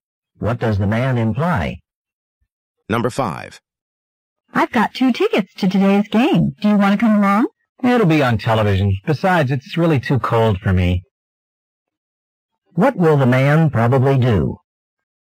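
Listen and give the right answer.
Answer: Watch the game on television.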